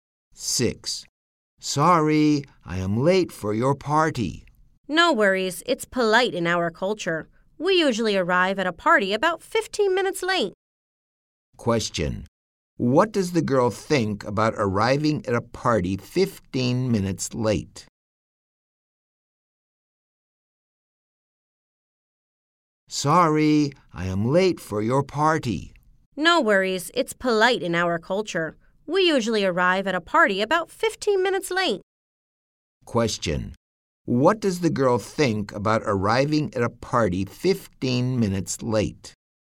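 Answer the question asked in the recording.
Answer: She thinks it is polite.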